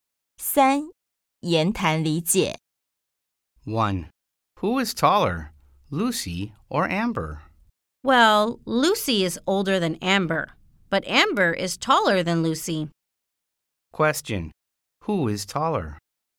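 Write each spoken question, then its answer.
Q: Who is taller?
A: Amber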